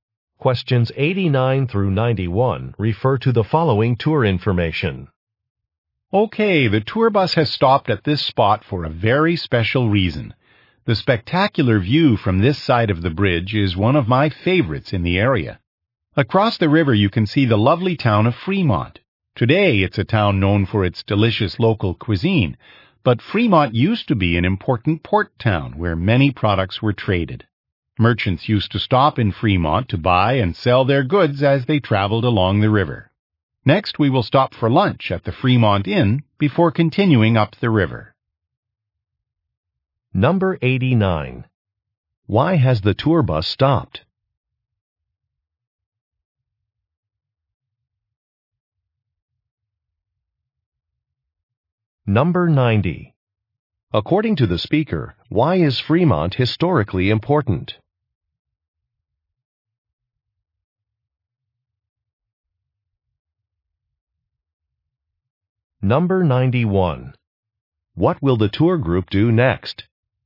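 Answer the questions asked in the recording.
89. To enjoy the view from the bridge
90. It was an important port town for trade
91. Have lunch at the Fremont Inn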